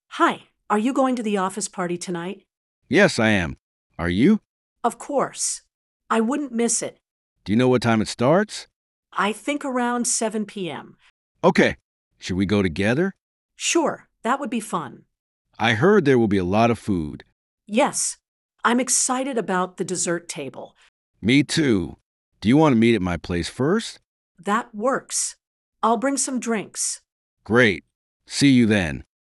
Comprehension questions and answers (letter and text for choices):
Listen to a conversation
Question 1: Why are A and B talking?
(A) About work tasks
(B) About the office party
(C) About dinner plans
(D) About travel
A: (B) About the office party

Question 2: What plan do they make?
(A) To meet at the office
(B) To meet at B's place before the party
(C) To cook food together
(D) To go shopping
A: (B) To meet at B's place before the party

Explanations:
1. They are discussing the office party details.
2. They agree to meet at B's place first.